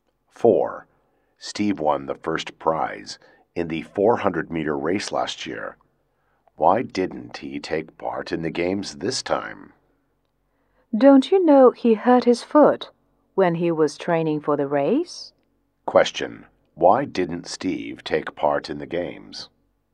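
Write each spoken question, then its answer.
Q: why didn't Steve take part in the games?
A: He hurt his foot while training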